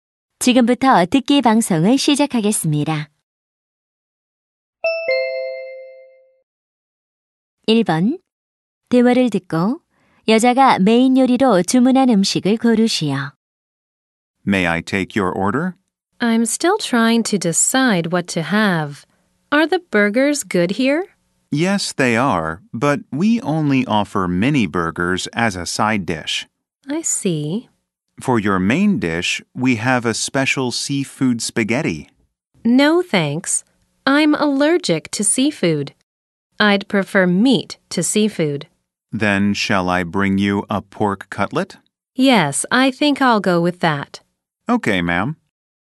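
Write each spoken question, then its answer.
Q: 대화를 듣고 여자가 메인 요리로 주문한 음식을 고르시오.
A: 돈가스 (pork cutlet)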